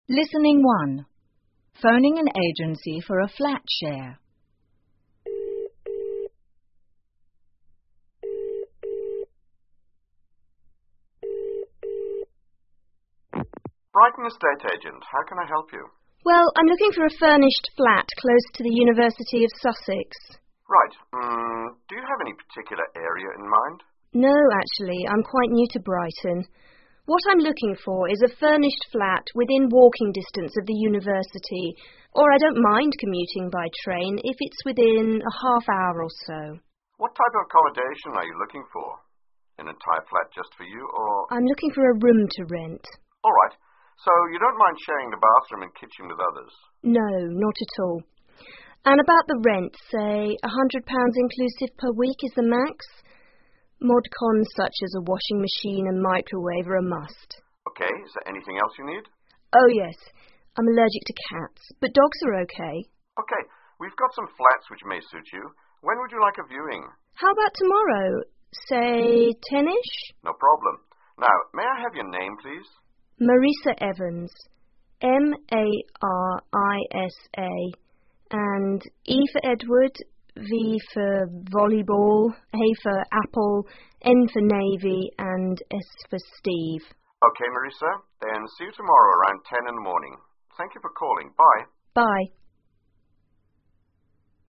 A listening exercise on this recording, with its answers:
请根据对话内容,判断下面的句子是否正确,如果符合对话内容,请在T做记号,如果不符合,请在F做记号。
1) The customer knows the Brighton area well.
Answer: F

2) The customer has a specific area where she would like to live.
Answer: F

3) The customer would like to pay the rent separately from the bills.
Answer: F

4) The customer is allergic only to cats.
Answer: T

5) The viewing will be held tomorrow afternoon.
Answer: F

请根据对话内容,选出一个正确的答案。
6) What type of accommodation is the customer looking for?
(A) A room with furniture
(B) An entire flat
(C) A flat without mod cons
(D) A flat where cats are allowed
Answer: A room with furniture

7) What is the job of the customer?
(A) A university student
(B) A university lecturer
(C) An estate agent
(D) Not stated in the conversation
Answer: Not stated in the conversation

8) What is the rent limit for the customer?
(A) £100 per week with bills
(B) £100 per week without bills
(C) £100 per month with bills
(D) £100 per month without bills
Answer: £100 per week with bills

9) Which of the following is mentioned as a mod con?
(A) A TV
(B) A microwave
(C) A DVD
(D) An answer phone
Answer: A microwave

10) Where will they meet tomorrow?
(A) At the University of Brighton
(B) At the University of Sussex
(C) At the flat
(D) Not stated in the conversation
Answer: Not stated in the conversation

请根据对话内容, 判断下面的句子是否则正确, 如果符合对话内容,请在T做记号,如果不符合,请在F做记号。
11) The customer is looking for an unfurnished flat.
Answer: F

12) The customer is busy tomorrow.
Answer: F

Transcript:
Estate Agent: Brighton Estate Agent, how can I help you?
Marisa: Well, I'm looking for a furnished flat close to the University of Sussex.
EA: Right, urm, do you have any particular area in mind?
M: No, actually, I'm quite new to Brighton. What I'm looking for is a furnished flat within walking distance of the university or I don't mind commuting by train if it's within a half hour or so.
EA: What type of accommodation are you looking for? An entire flat just for you or...
M: I'm looking for a room to rent.
EA: All right, so you don't mind sharing the bathroom and kitchen with others.
M: No. Not at all. And about the rent, say £100 inclusive per week is the max. Mod cons such as a washing machine and microwave are a must.
EA: OK, is there anything else you need?
M: Oh, yes, I'm allergic to cats but dogs are OK.
EA: OK, we've got some flats which may suits you. When would you like a viewing?
M: How about tomorrow? Say tenish? No problem. Now, may I have your name, please?
M: Marisa Evans. M-A-R-I-S-A and E for Edward, V for volleyball, A for apple, N for navy and S for Steve.
EA: Ok, Marisa, the see you tomorrow around 10 in the morning. Thank you for calling. Bye.
M: Bye.

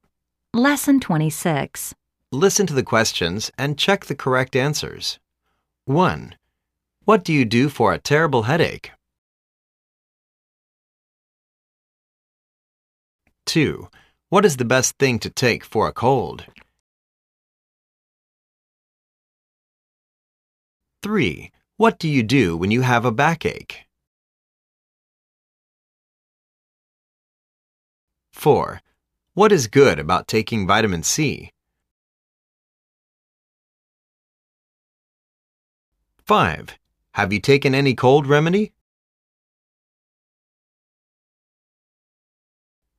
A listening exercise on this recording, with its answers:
Listen to the questions and check out the correct answers.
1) What do you do for a terrible headache?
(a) I take aspirin. It works.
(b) I go to see the dentist.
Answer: I take aspirin. It works.

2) What is the best thing to take for a cold?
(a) lce cream.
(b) Hot lemon tea with a bit of salt.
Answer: Hot lemon tea with a bit of salt.

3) What do you do when you have a backache?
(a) I usually go to see a chiropractor.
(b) I never had a headache.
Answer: I usually go to see a chiropractor.

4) What is good about taking vitamin C?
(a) It can help you to prevent getting flu easily.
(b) It can remedy your earache.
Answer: It can help you to prevent getting flu easily.

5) Have you taken any cold remedy?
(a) Yes. I had the Dr's medicine before I go to bed.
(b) Yes. I had a fever when I staying in bed.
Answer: Yes. I had the Dr's medicine before I go to bed.

